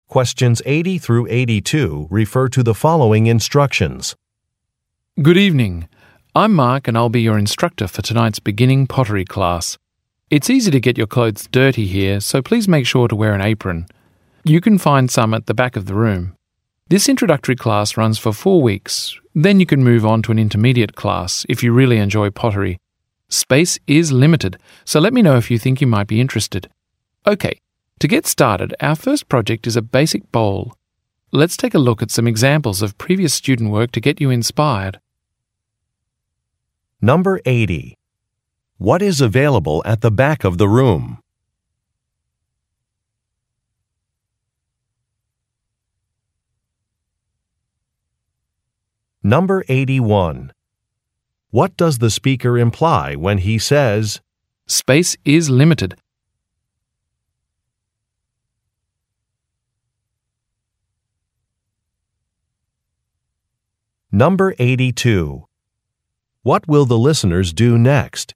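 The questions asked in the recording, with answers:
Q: What is available at the back of the room?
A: Aprons

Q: What does the speaker imply when he says, "Space is limited"?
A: Listeners interested in the intermediate class should sign up soon

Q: What will the listeners do next?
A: Look at examples of previous student work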